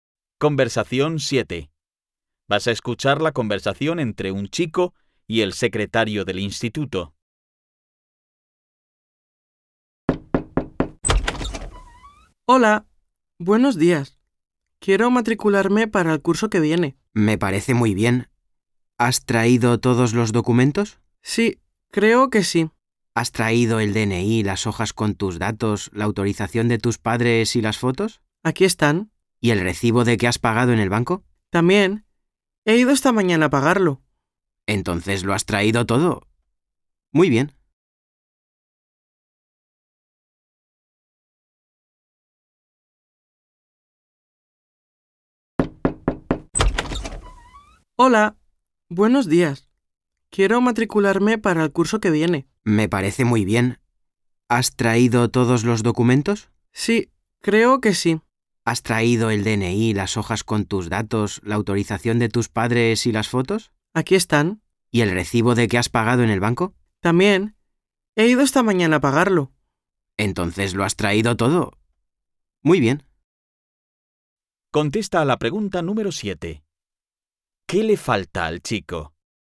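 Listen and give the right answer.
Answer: Nada, lo ha traído todo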